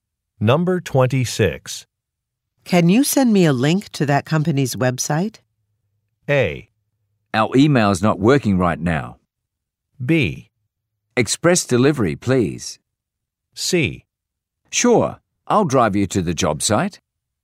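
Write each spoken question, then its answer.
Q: Can you send me a link to that company's website?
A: A: Our email is not working right now.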